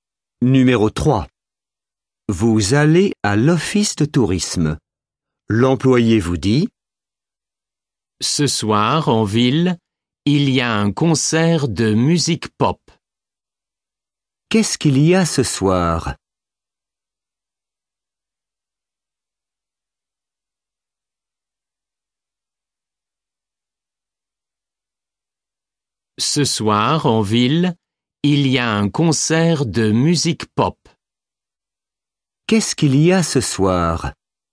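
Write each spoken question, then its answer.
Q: Qu'est-ce qu'il y a ce soir?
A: Un concert de musique pop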